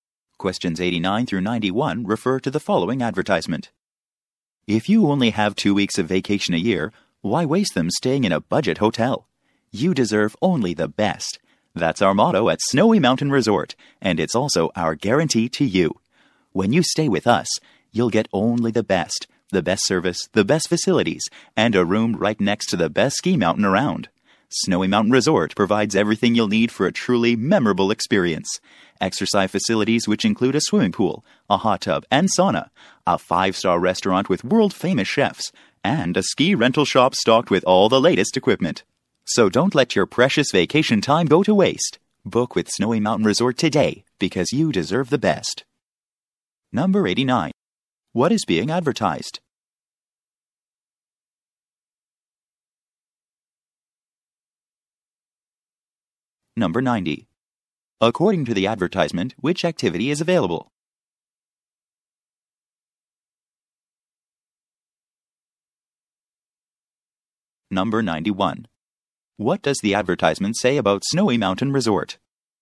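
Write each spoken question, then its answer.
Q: What is being advertised?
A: A ski resort (Snowy Mountain Resort)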